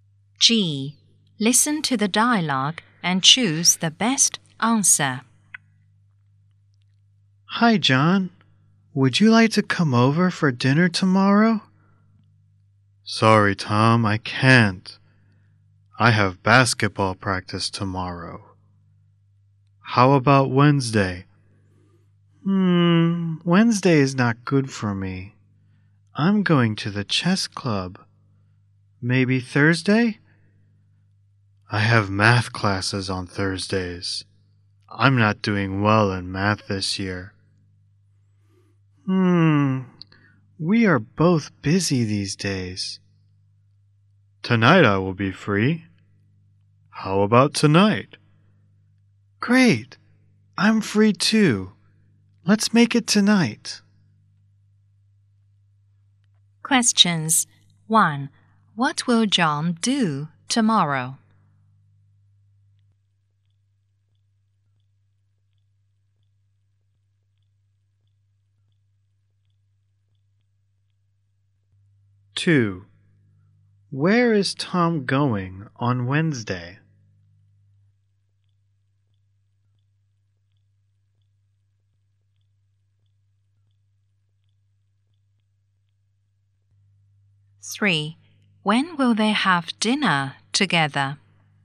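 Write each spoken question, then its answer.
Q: What will John do tomorrow?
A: Have basketball practice

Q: When will they have dinner together?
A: Tonight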